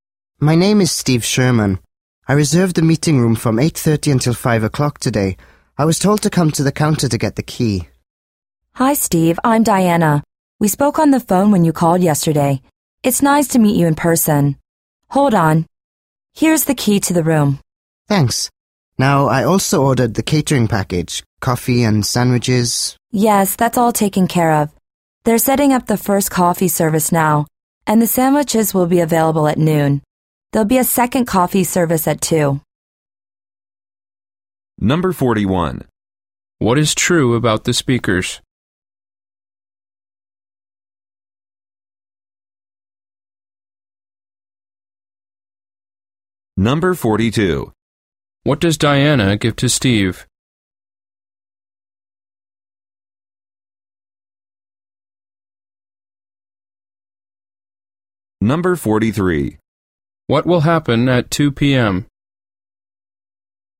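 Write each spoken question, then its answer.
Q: What does Diana give to Steve?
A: The key to the meeting room

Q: What will happen at 2 p.m.?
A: A second coffee service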